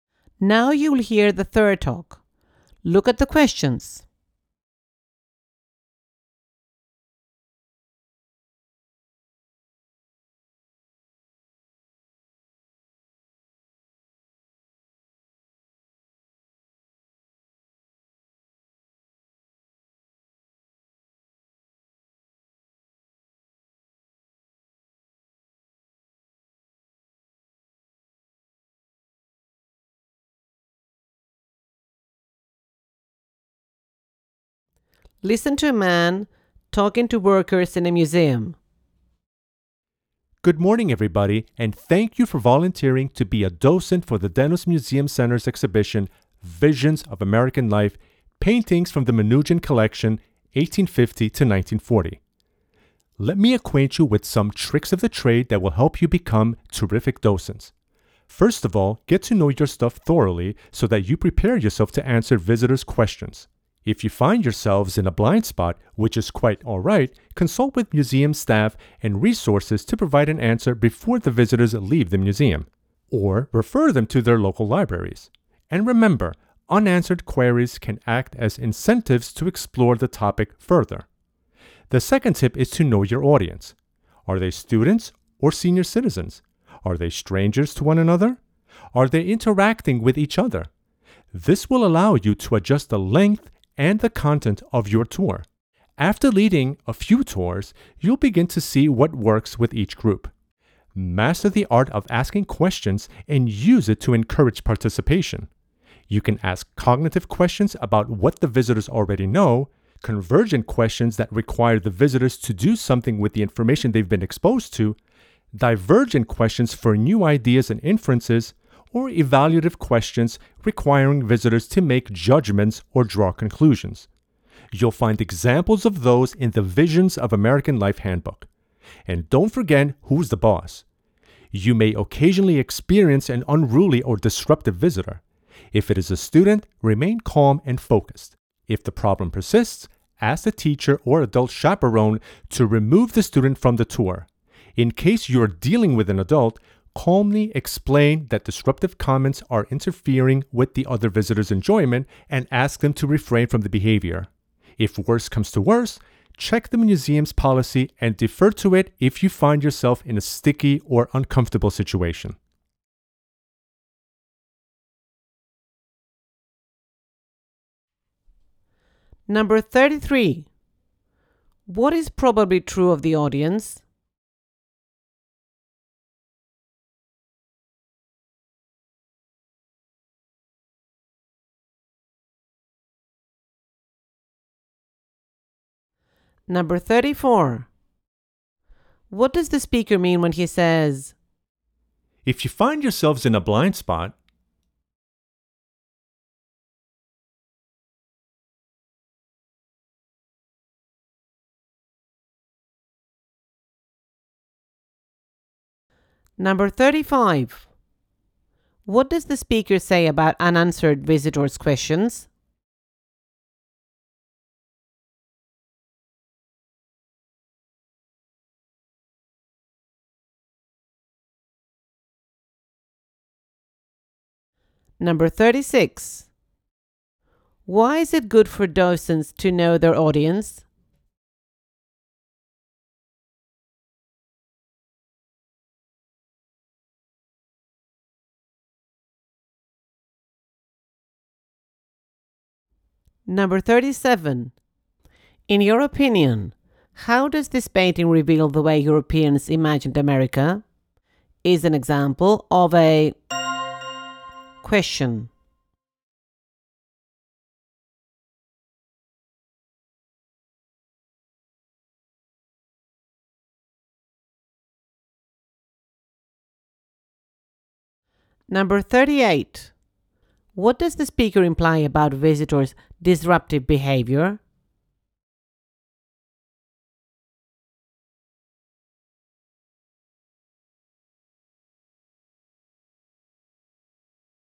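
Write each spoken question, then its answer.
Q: What is probably true of the audience?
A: They are new volunteer docents

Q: What does the speaker mean when he says, "If you find yourselves in a blind spot"?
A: If you don't know the answer to a visitor's question

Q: What does the speaker say about unanswered visitors' questions?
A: They can encourage visitors to explore the topic further

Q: Why is it good for docents to know their audience?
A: So they can adjust the length and content of the tour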